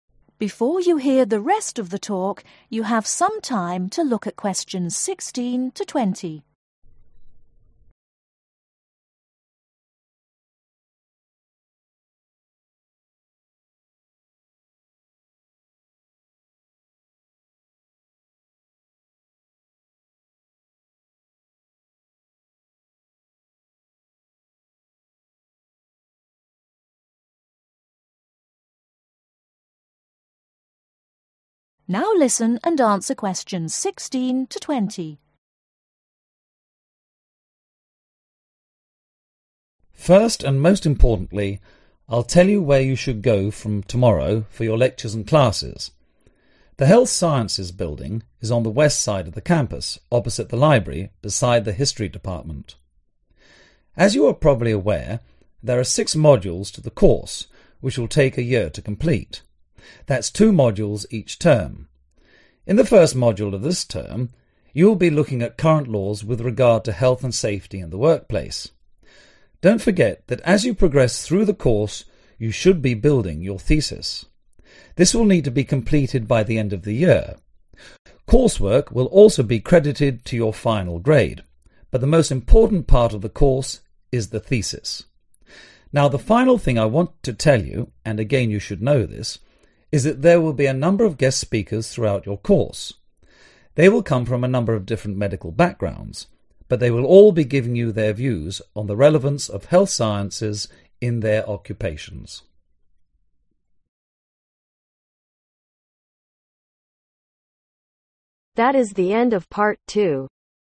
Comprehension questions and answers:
Complete the information below. Write NO MORE THAN TWO WORDS for each answer.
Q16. The Health Sciences building is next to the history ............ .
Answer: Department

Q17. There are ............ each term.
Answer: Two Modules

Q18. In the first module, students will study health and safety in the ............ .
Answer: Work Place

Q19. Students will have to complete a ............ by the end of the course.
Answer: Thesis

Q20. There will be speakers from various ............ .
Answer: Medical Backgrounds